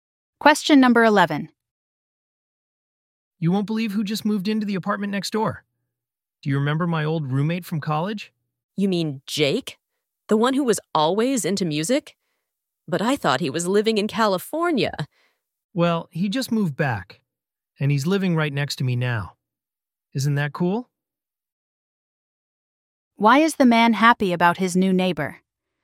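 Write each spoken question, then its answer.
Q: Why is the man happy about his new neighbor?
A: It is his old college roommate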